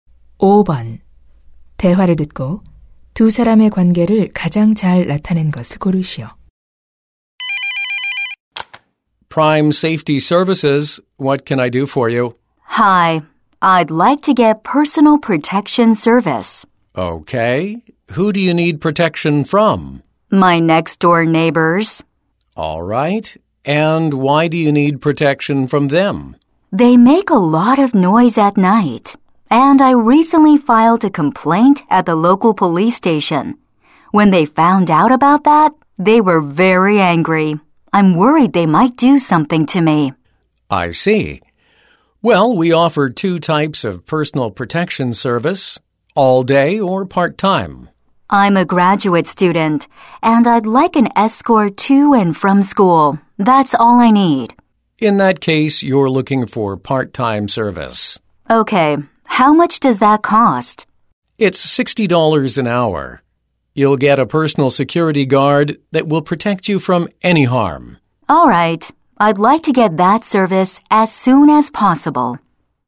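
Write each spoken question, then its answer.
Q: 대화를 듣고 두 사람의 관계를 가장 잘 나타낸 것을 고르시오.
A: 경호 업체 직원 - 고객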